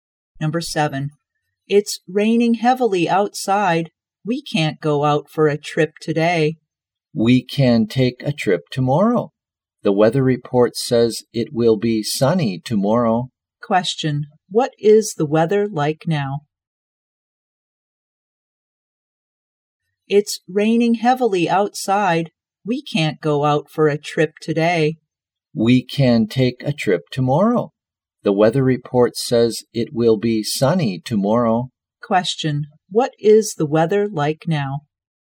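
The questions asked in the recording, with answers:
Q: what is the weather like now?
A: Raining heavily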